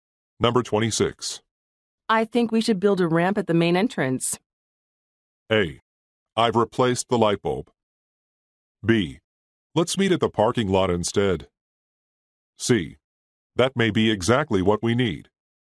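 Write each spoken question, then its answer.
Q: I think we should build a ramp at the main entrance.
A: C: That may be exactly what we need.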